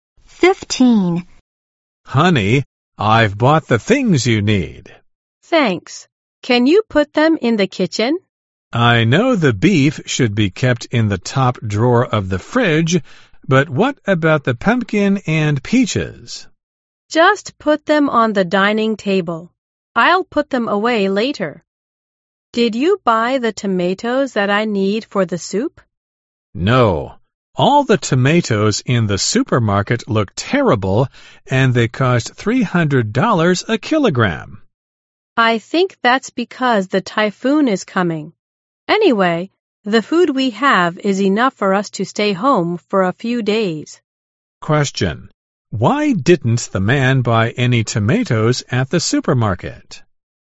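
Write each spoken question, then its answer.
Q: Why didn't the man buy any tomatoes at the supermarket?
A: They all looked terrible and were expensive ($300 a kilogram).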